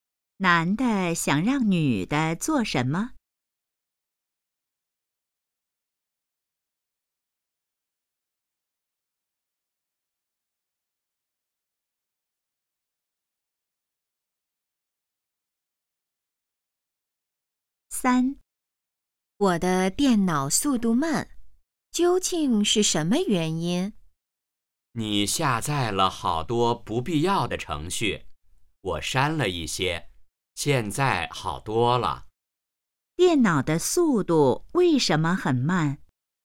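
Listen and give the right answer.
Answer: 下载了好多不必要的程序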